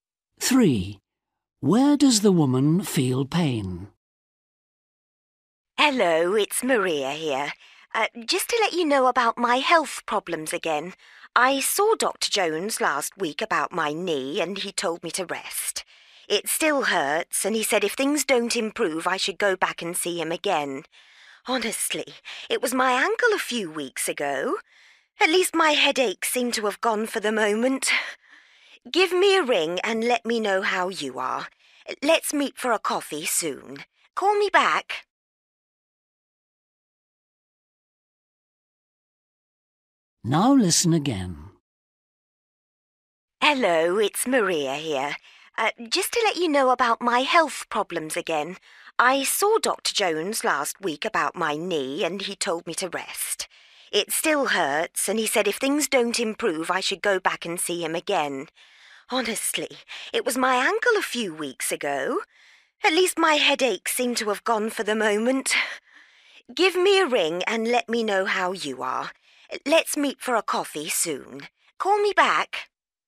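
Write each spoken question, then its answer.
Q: Where does the woman feel pain?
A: her knee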